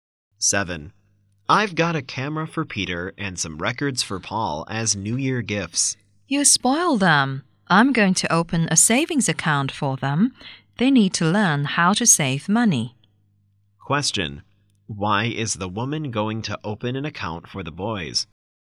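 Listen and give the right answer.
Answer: So they learn how to save money.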